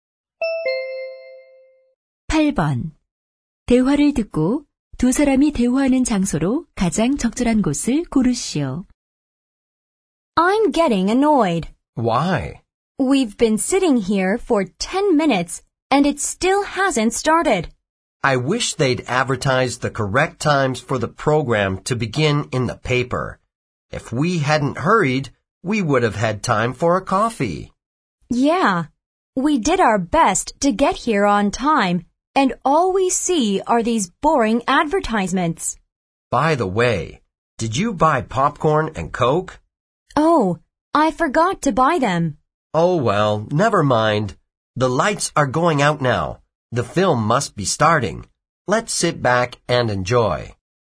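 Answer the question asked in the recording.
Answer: 영화관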